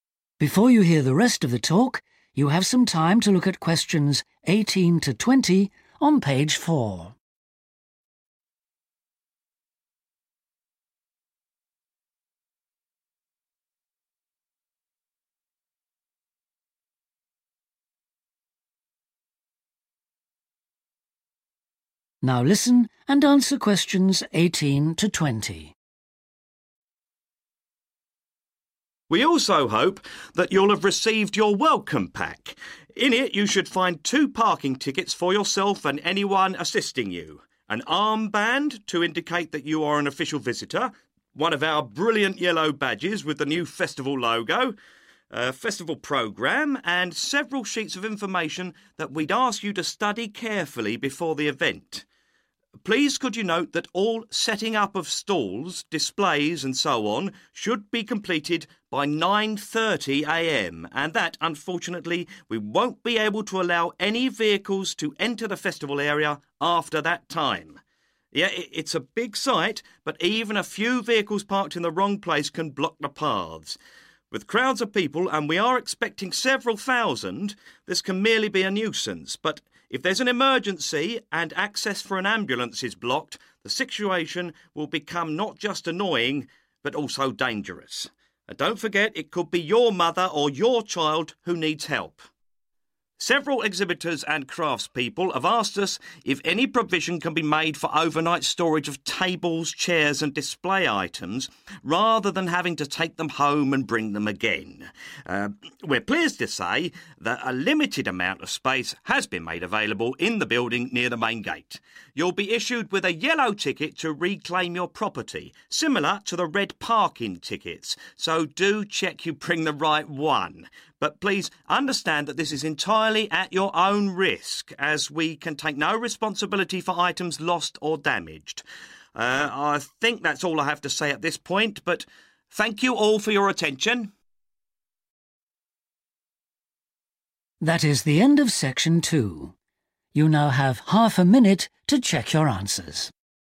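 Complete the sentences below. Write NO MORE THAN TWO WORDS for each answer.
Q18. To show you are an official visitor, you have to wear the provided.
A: armband

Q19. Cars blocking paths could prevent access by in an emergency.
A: an ambulance

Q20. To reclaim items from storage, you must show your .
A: yellow ticket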